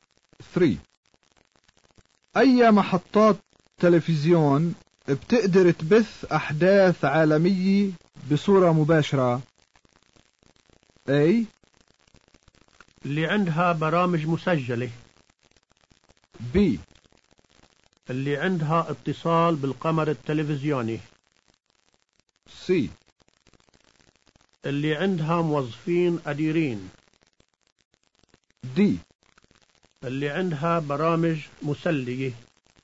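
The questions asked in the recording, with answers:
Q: أي محطات تلفزيون بتقدر تبث أحداث عالمية بصورة مباشرة؟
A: B: اللي عندها اتصال بالقمر التلفزيوني.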